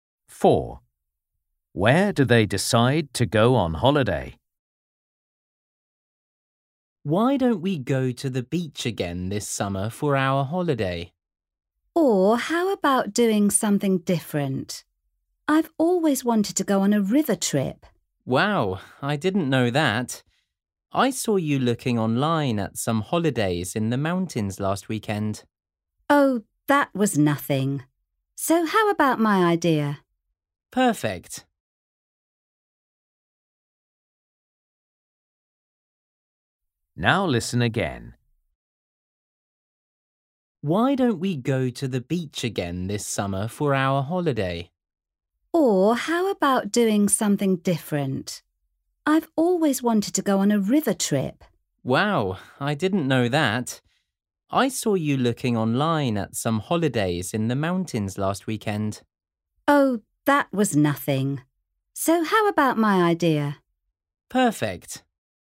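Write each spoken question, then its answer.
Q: Where do they decide to go on holiday?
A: On a river trip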